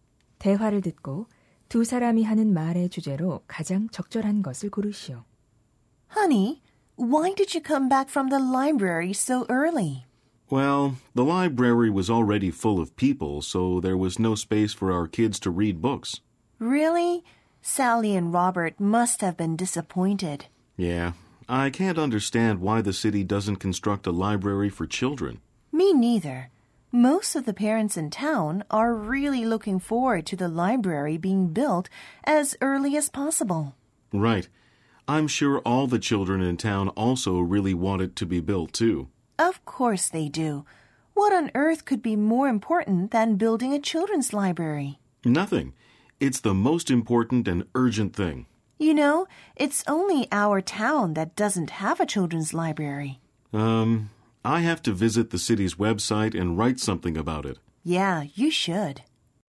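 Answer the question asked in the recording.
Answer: 어린이 도서관 건립의 필요성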